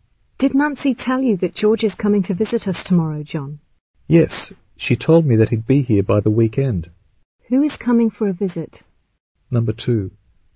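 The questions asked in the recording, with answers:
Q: Who is coming for a visit?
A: George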